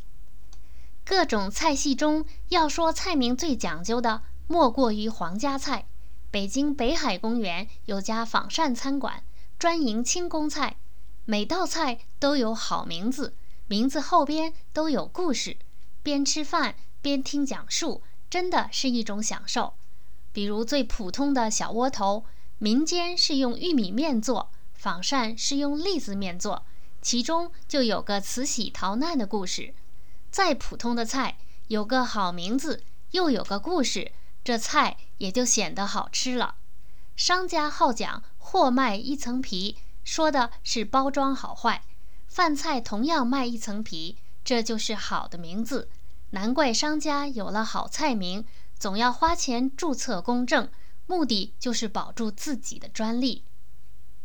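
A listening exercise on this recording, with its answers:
Please answer the following questions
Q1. 北京清宫菜的名字有什么特点?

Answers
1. 每道菜都有好名字,名字后边都有故事

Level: 3rd Year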